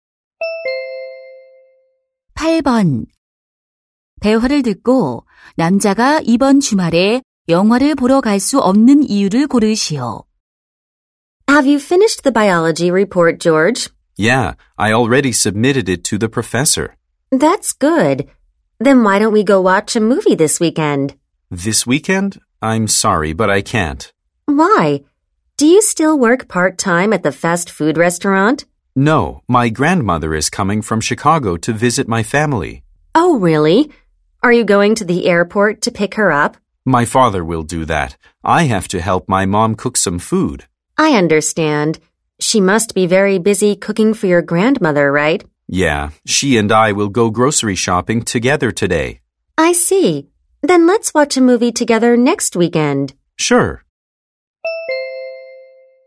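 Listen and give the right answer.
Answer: 할머니 방문으로 엄마의 요리를 도와야 해서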